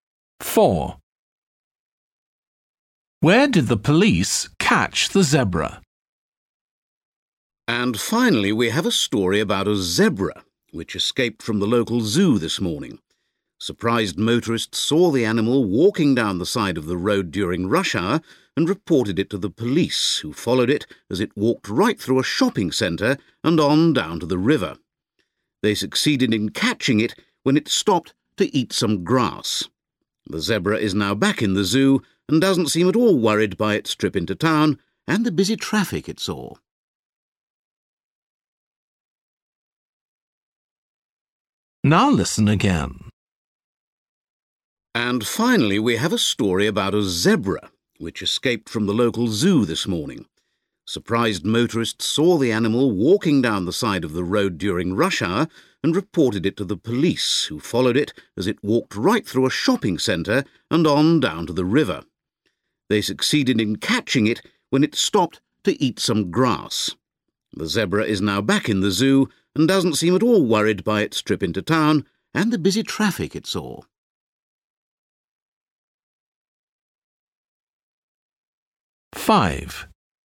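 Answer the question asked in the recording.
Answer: by the river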